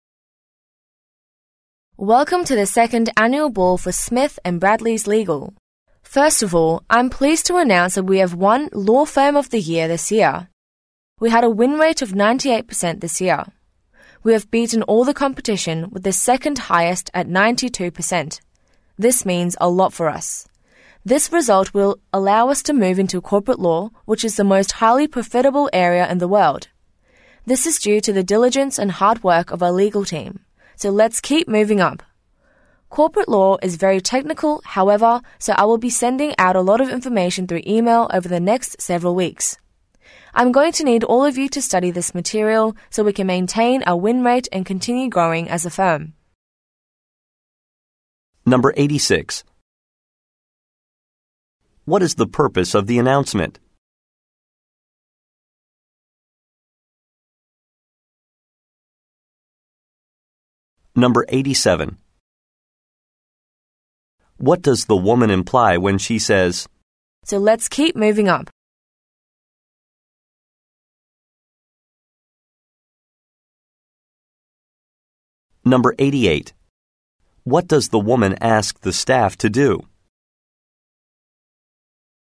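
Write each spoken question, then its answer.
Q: What is the purpose of the announcement?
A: To announce that the firm won Law Firm of the Year

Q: What does the woman ask the staff to do?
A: Study the material she will send by email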